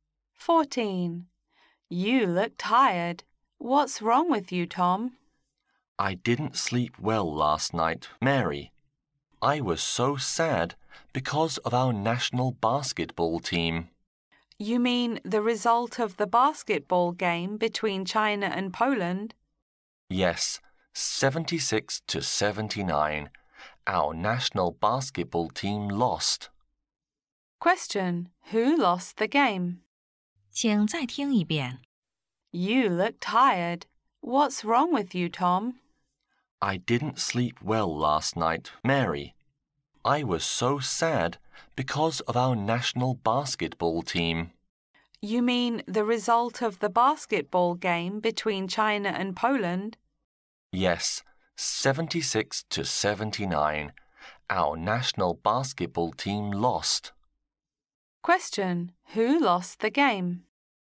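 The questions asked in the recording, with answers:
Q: Who lost the game?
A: The Chinese national basketball team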